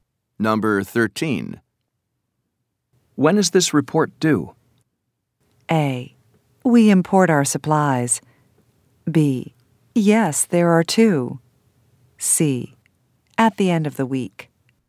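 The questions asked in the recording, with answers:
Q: When is this report due?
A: C: At the end of the week.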